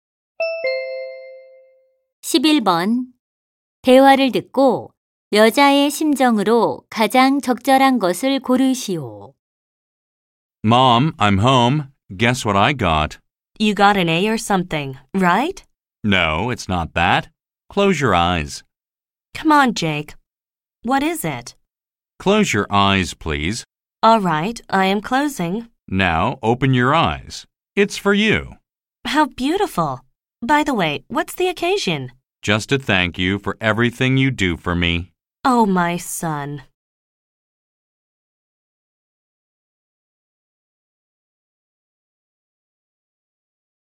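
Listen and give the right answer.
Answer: 감동함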